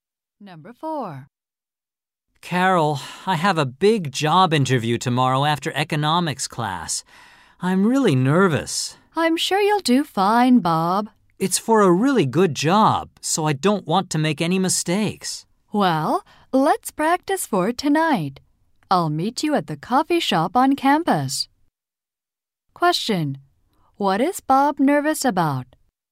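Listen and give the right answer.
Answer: His big job interview tomorrow.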